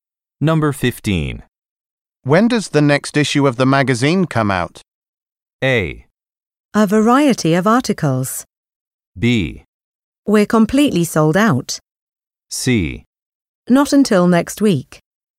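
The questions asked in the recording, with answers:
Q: When does the next issue of the magazine come out?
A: C: Not until next week.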